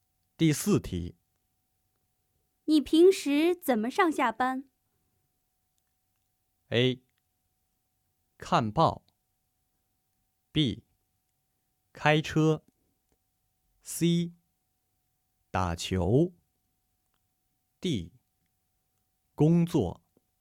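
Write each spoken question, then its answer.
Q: 你平时怎么上下班?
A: B: 开车。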